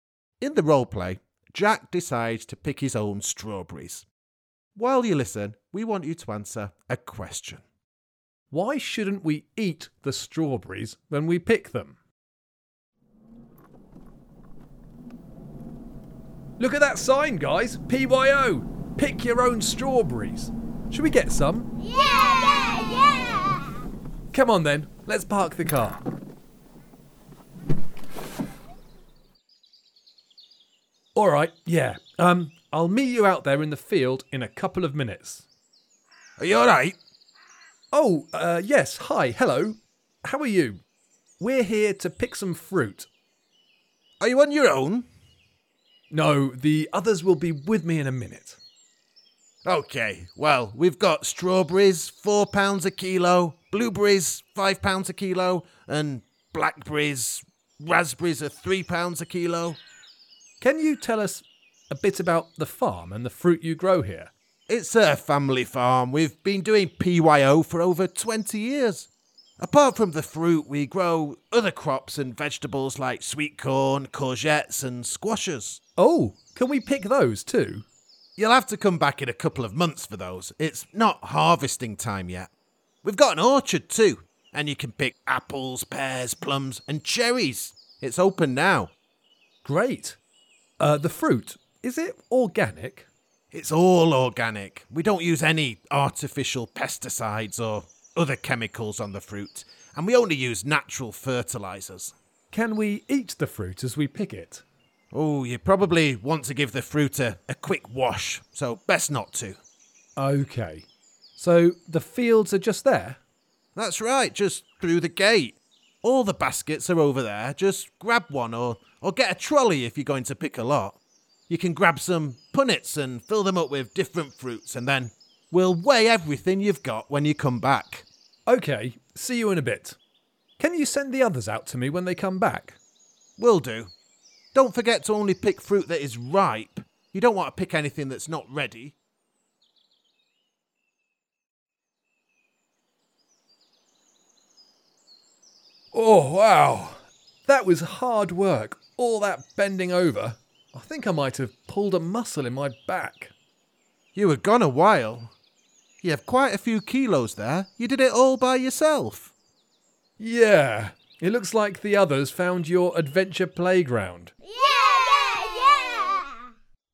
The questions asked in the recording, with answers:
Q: Why shouldn't we eat the strawberries when we pick them?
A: Because you should probably wash them first.